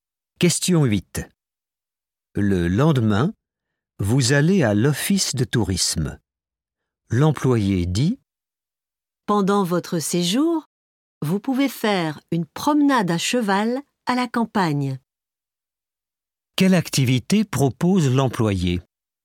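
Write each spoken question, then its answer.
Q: Quelle activité propose l'employé ?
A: une promenade à cheval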